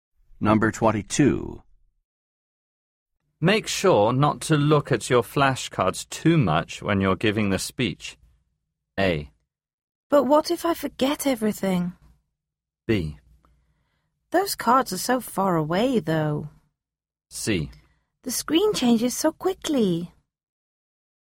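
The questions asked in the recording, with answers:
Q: Make sure not to look at your flashcards too much when you're giving the speech.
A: A: But what if I forget everything?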